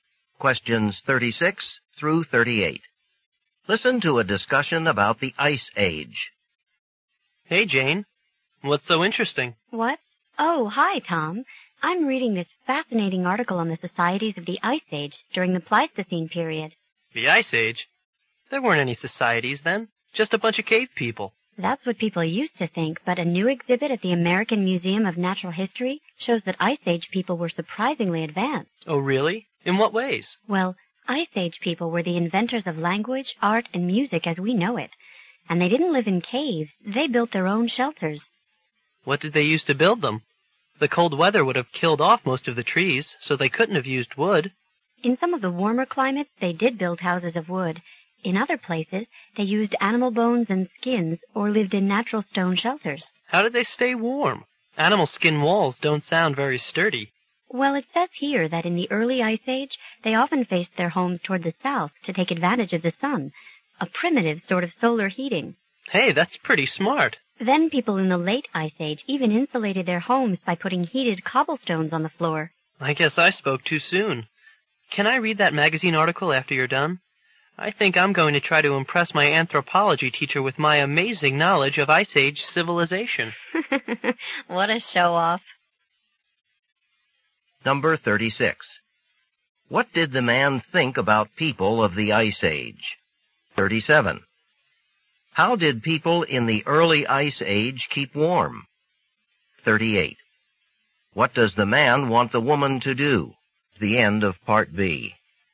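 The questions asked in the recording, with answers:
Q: What did the man think about people of the Ice Age?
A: They were just cave people, not advanced

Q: How did people in the early Ice Age keep warm?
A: They faced their homes toward the south to use the sun

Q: What does the man want the woman to do?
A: Let him read the magazine article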